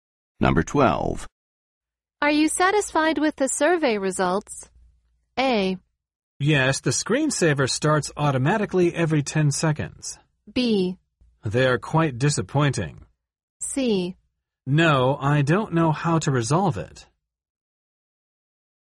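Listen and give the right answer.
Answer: B: They're quite disappointing.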